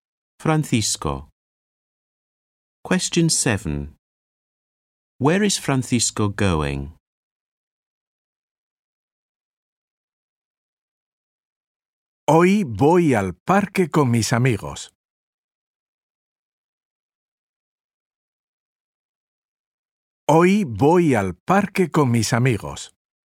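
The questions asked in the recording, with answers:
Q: Where is Francisco going?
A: To the park with his friends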